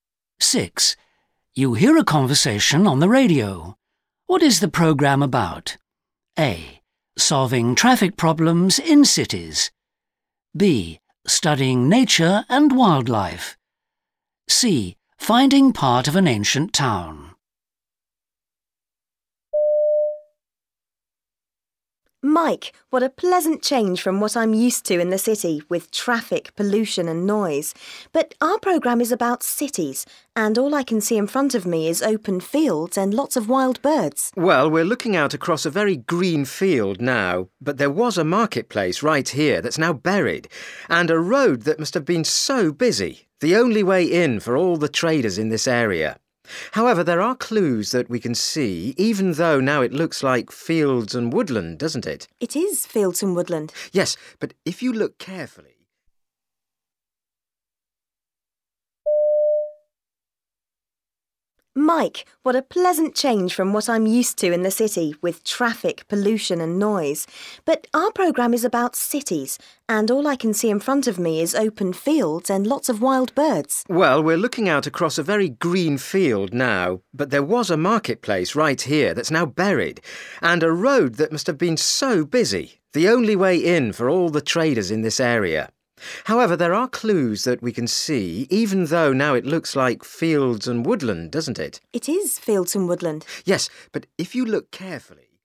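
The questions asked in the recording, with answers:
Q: What is the programme about?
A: C: Finding part of an ancient town.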